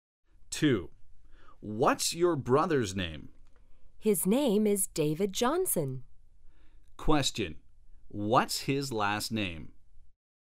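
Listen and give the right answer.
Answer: Johnson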